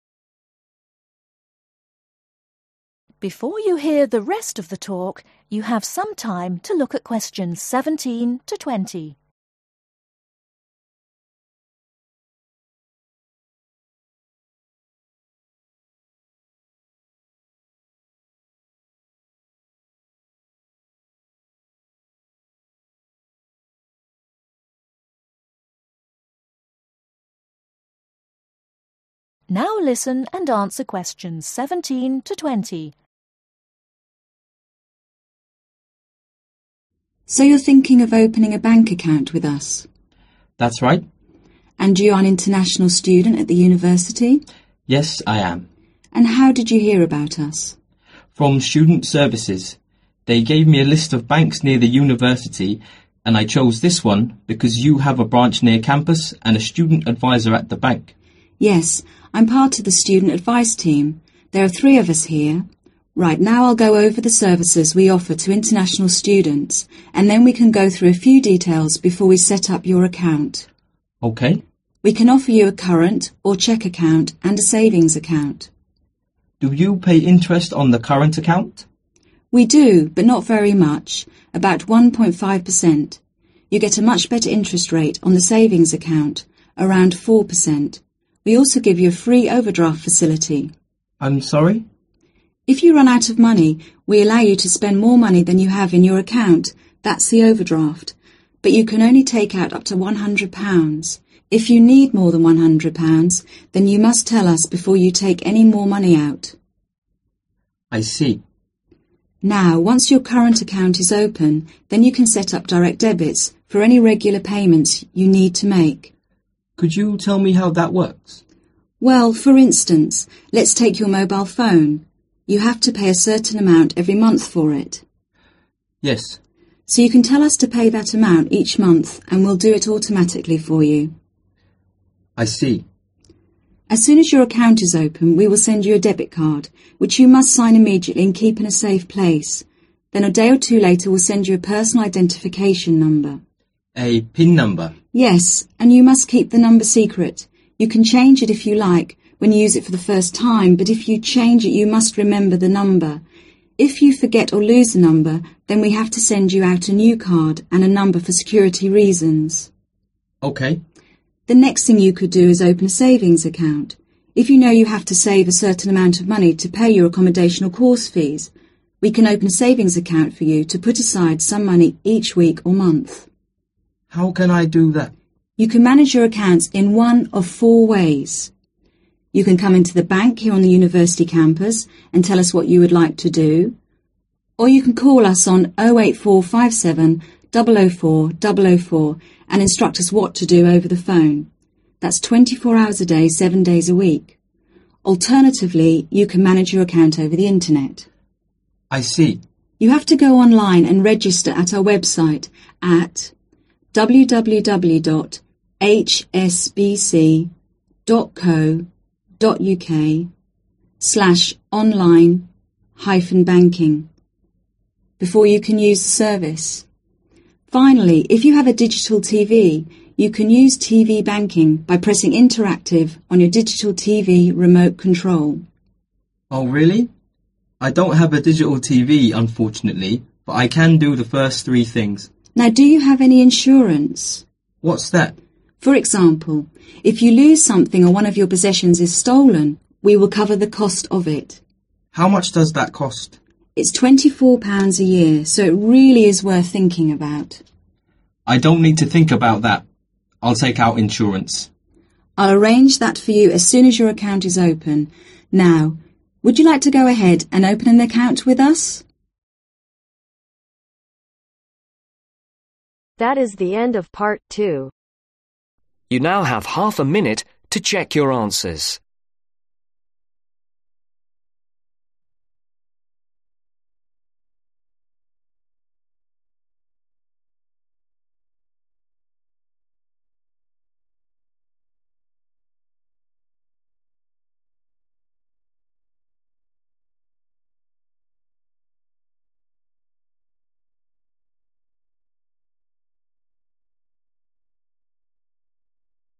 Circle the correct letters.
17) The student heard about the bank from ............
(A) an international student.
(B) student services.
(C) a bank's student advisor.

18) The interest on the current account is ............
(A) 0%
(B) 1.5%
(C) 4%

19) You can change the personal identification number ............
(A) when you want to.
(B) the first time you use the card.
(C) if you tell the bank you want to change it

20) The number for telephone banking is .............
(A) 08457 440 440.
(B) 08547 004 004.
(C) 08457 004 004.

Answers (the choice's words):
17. student services.
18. 1.5%
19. the first time you use the card.
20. 08457 004 004.